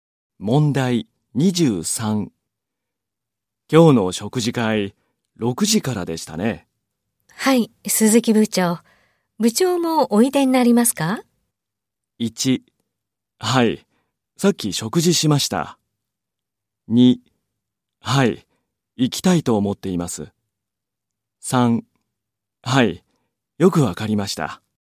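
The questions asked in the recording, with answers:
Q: 今日の食事会、6時からでしたね。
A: 2: はい、行きたいと思っています。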